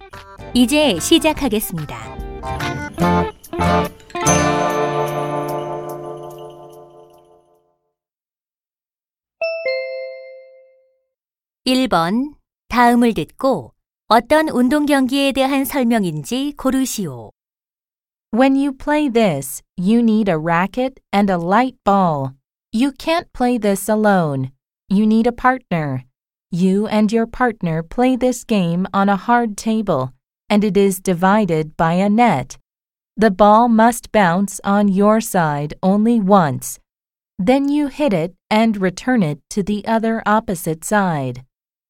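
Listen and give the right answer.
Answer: 탁구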